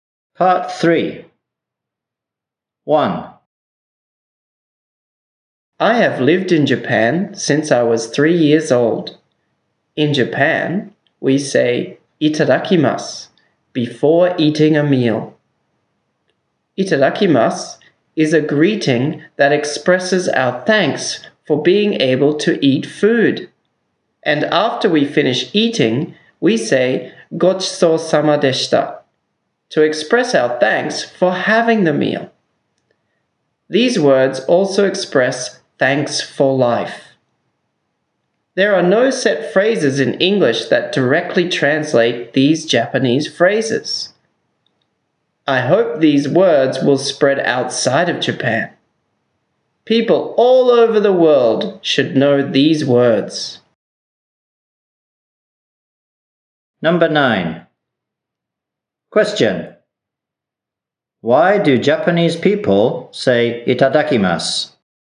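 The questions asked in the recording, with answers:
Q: Why do Japanese people say itadakimasu?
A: To express thanks for being able to eat food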